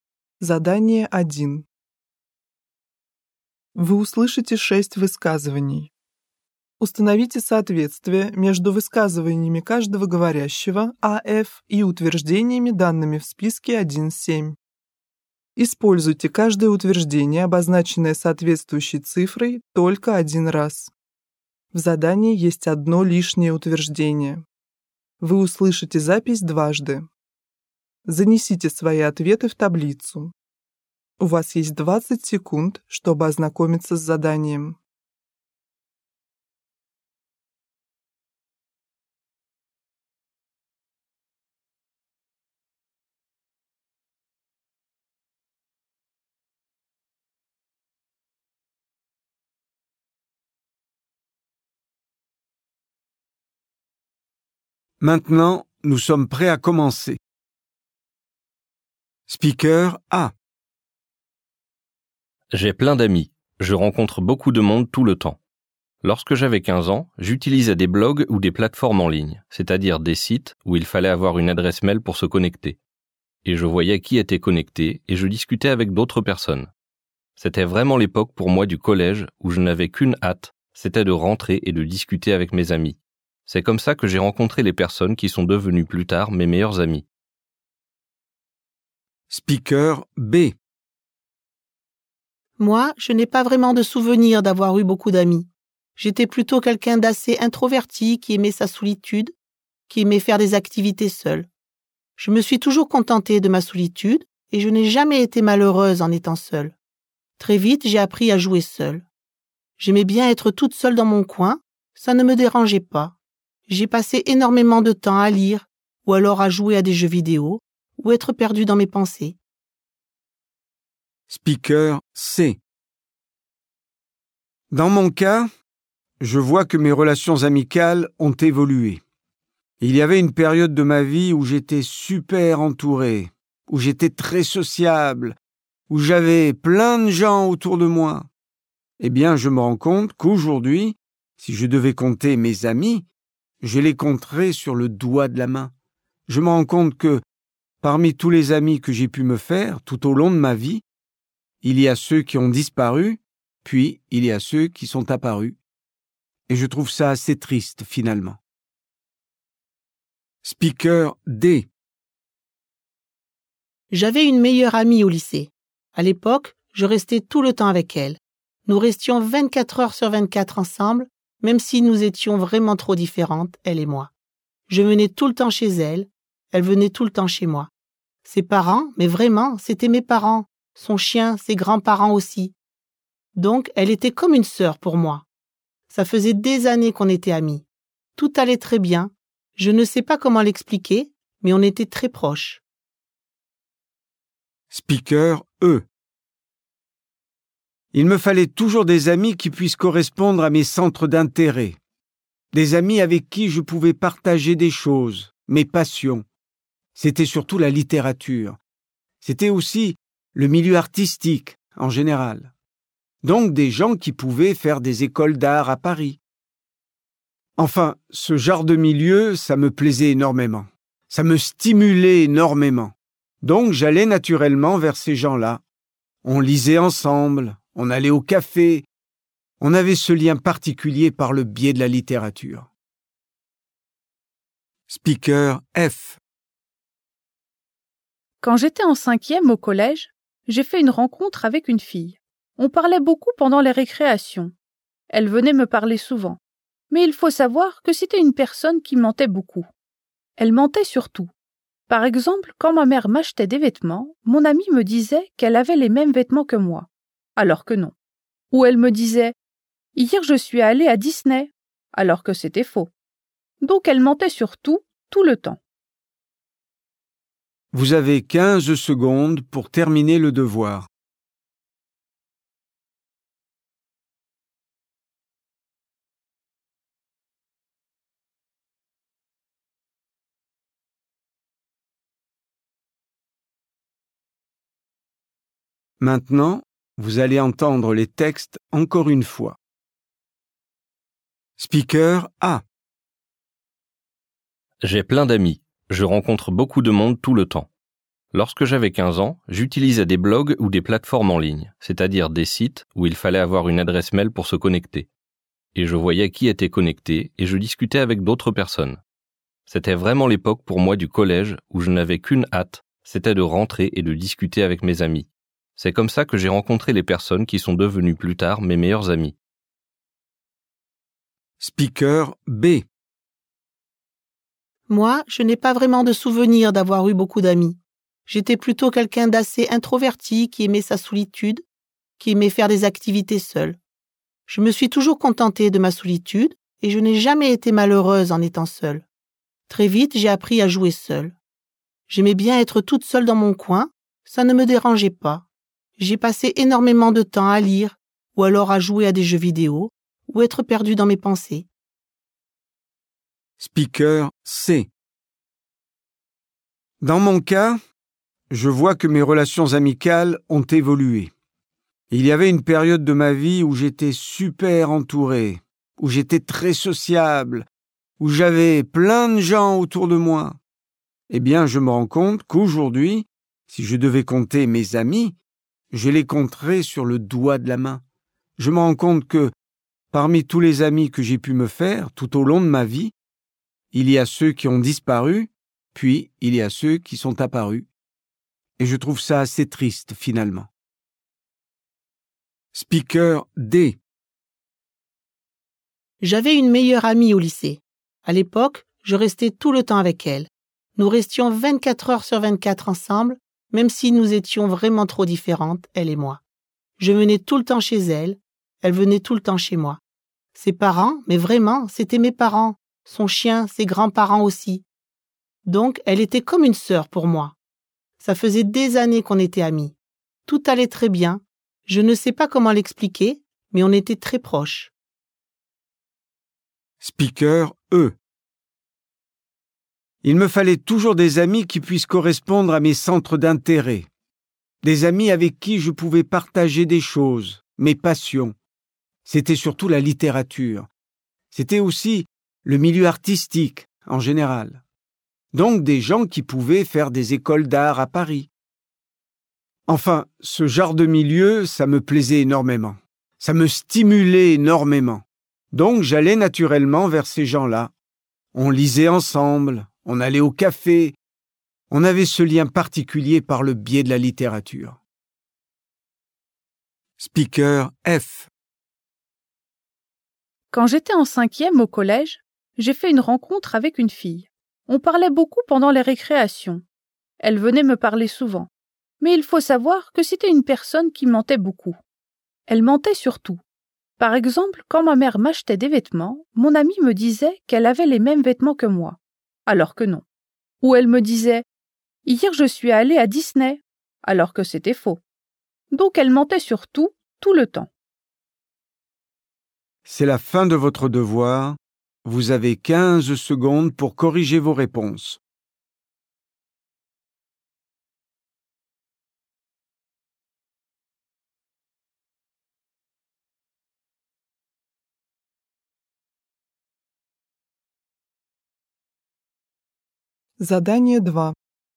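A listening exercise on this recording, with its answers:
Un véritable ami aide à faire les devoirs du collège.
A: l'affirmation en trop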